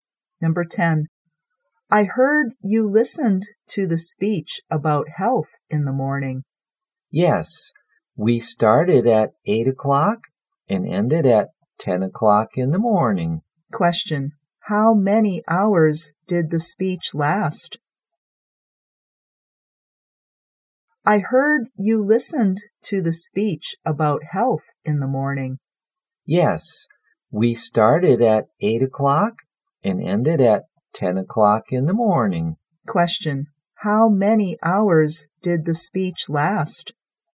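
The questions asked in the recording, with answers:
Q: How many hours did the speech last?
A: Two hours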